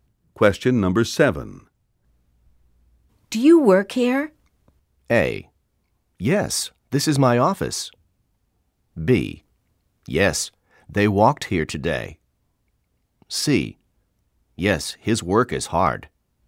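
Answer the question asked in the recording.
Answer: A: Yes, this is my office.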